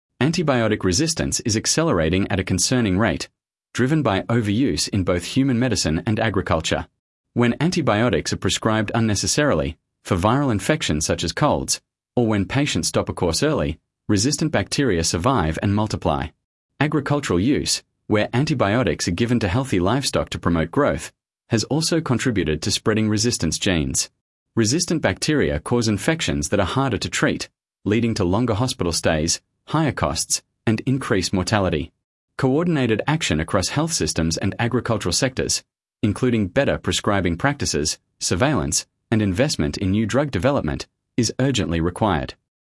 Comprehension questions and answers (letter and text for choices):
Sample Text 2 — Antibiotic Resistance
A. A. Antibiotics should be banned from use in agriculture as this is entirely responsible for the rise of resistant bacteria.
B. B. Antibiotic resistance arises from overuse in both medicine and farming, posing a serious global health threat that requires coordinated stewardship across sectors.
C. C. The development of new antibiotics is progressing well and will soon overcome the problem of resistance.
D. D. Resistant bacteria only emerge when patients fail to complete their prescribed antibiotic courses.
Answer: B. B. Antibiotic resistance arises from overuse in both medicine and farming, posing a serious global health threat that requires coordinated stewardship across sectors.